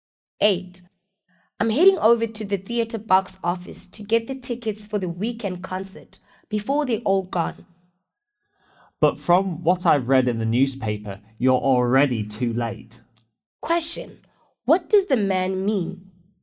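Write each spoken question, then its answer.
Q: What does the man mean?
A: The concert tickets are probably sold out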